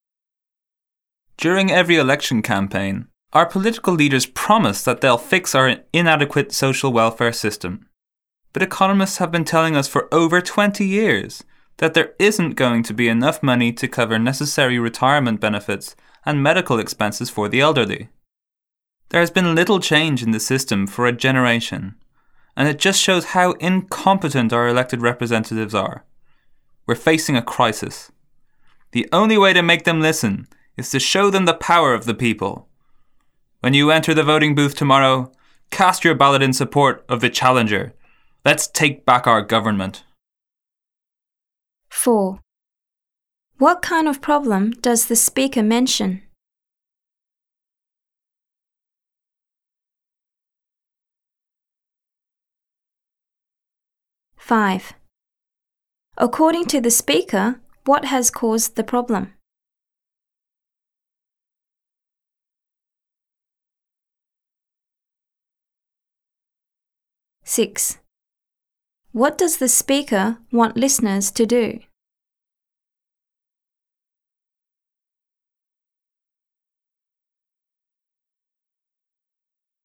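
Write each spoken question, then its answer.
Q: What kind of problem does the speaker mention?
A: An inadequate social welfare system that won't have enough money for retirement benefits and medical expenses for the elderly

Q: According to the speaker, what has caused the problem?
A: Incompetent elected representatives who haven't changed the system

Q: What does the speaker want listeners to do?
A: Vote for the challenger in tomorrow's election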